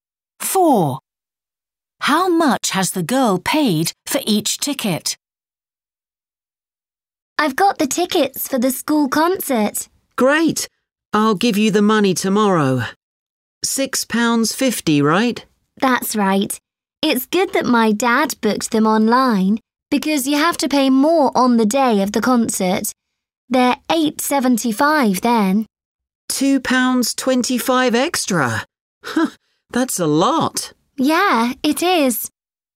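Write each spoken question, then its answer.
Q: How much has the girl paid for each ticket?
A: £6.50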